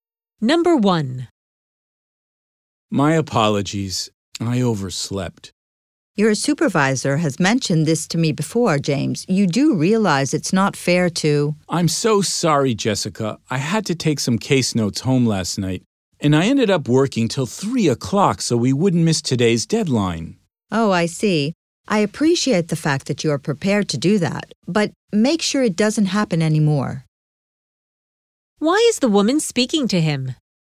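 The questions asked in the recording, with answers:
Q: Why is the woman speaking to him?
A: Because he was late (overslept) again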